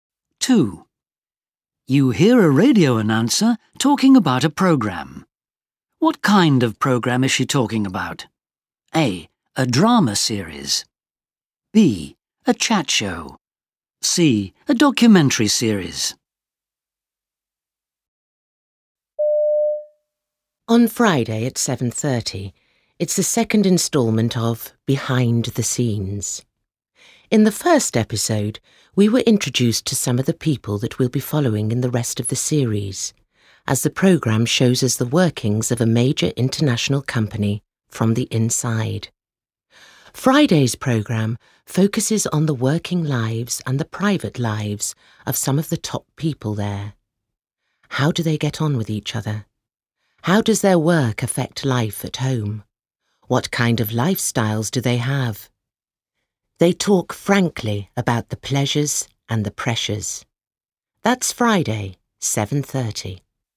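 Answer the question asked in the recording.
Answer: C: A documentary series.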